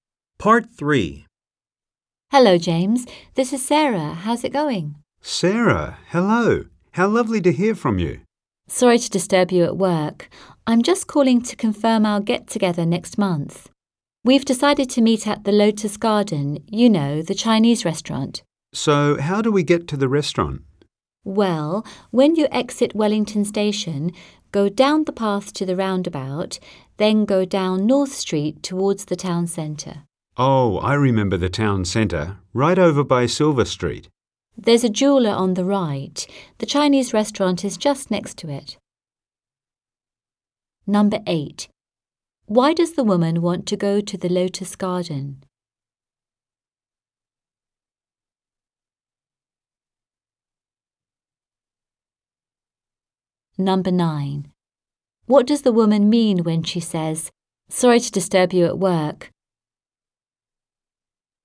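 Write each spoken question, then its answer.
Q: Why does the woman want to go to the Lotus Garden?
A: For a get-together next month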